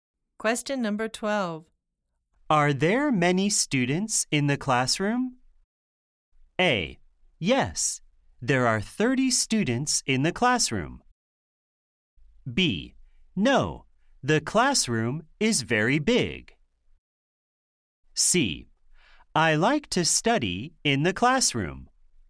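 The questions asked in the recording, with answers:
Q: Are there many students in the classroom?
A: A: Yes, there are 30 students in the classroom.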